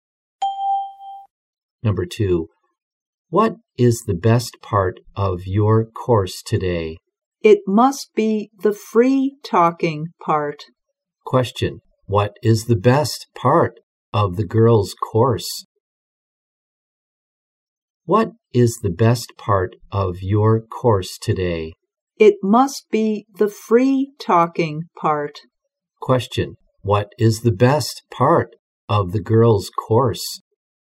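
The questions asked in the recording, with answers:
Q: What is the best part of the girl's course?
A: The free talking part.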